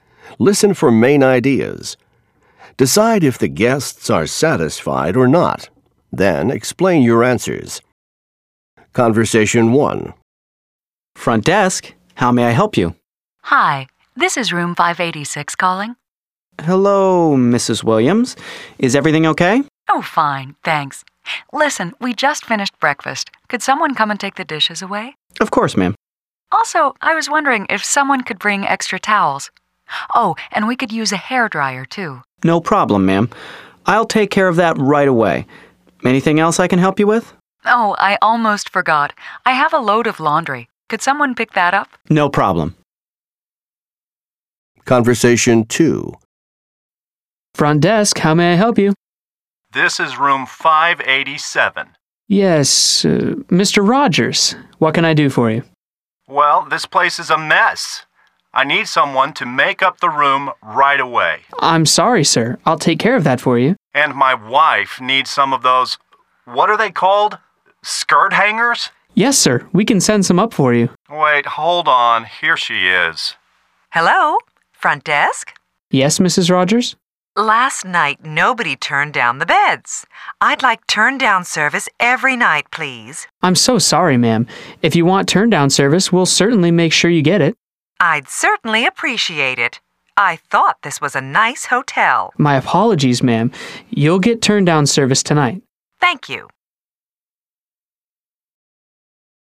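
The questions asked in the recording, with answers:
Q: Decide if the guests are satisfied or not.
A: Satisfied

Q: Decide if the guests are satisfied or not.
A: Not satisfied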